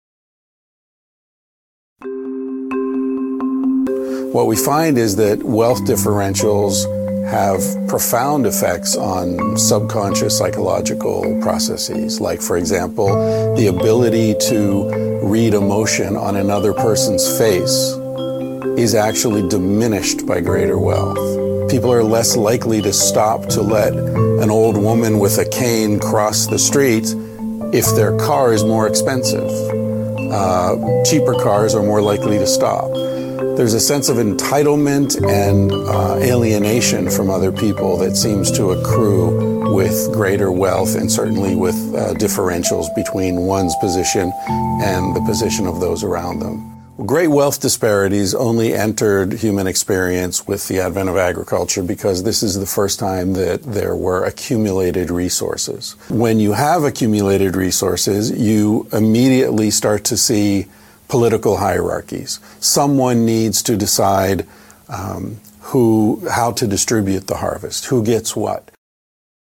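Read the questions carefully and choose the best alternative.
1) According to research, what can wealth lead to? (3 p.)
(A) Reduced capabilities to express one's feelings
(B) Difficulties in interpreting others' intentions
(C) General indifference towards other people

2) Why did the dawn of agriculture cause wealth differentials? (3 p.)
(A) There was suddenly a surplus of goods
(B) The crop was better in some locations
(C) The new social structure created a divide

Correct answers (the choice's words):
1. General indifference towards other people
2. The new social structure created a divide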